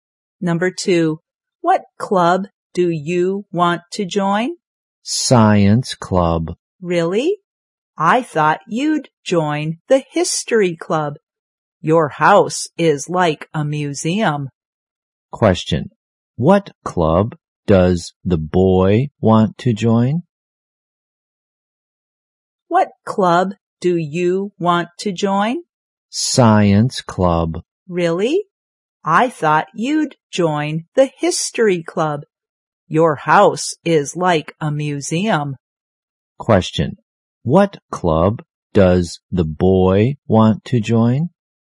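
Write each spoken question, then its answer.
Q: What club does the boy want to join?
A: Science club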